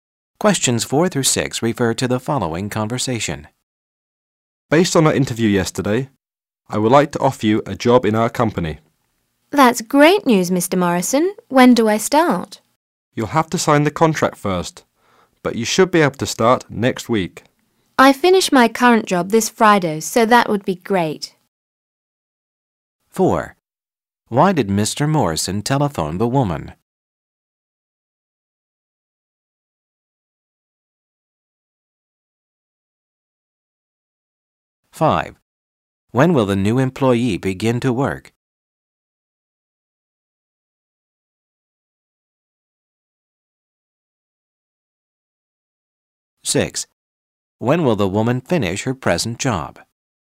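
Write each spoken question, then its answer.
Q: Why did Mr. Morrison telephone the woman?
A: To offer her a job

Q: When will the new employee begin to work?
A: Next week

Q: When will the woman finish her present job?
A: This Friday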